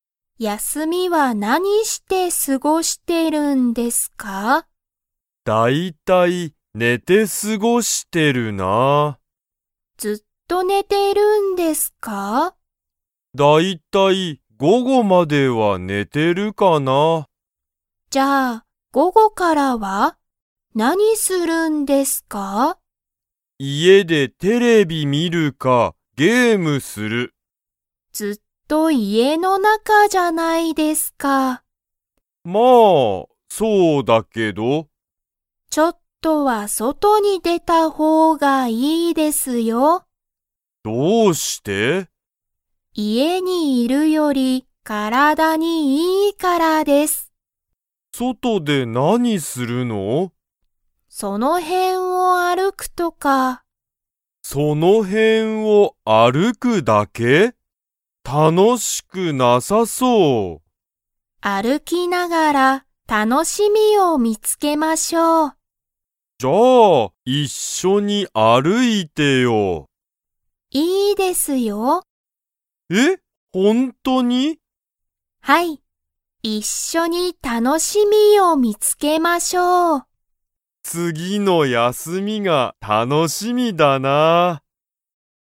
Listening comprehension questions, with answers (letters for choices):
Comprehension Quiz (Skip if you don't understand the conversation yet)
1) えいたは、休やすみは午後ごごから大体だいたい何なにをしますか?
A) パソコンをする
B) ゲームをする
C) 勉強べんきょうする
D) その辺へんを歩あるく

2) まどかは、次つぎの休やすみにえいたと一緒いっしょに 。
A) 歩あるく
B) 歩あるかない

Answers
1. B
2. A

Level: Level 3